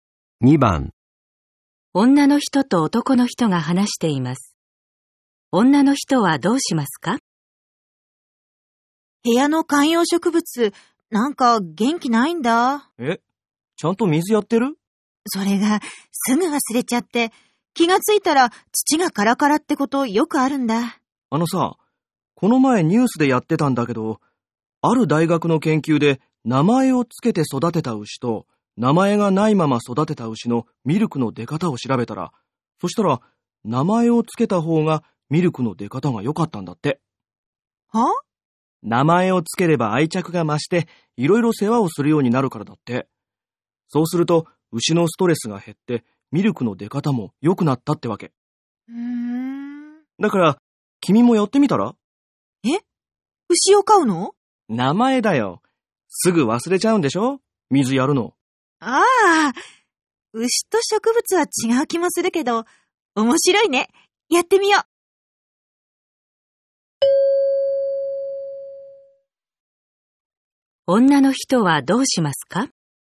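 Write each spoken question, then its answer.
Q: 女の人はどうしますか?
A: 観葉植物に名前をつける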